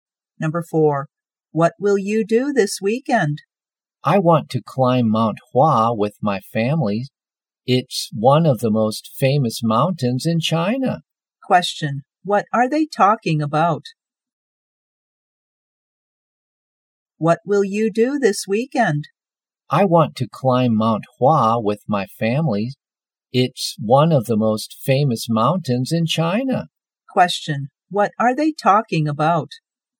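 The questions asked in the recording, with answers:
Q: Question, what are they talking about?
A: Weekend plans: climbing Mount Hua.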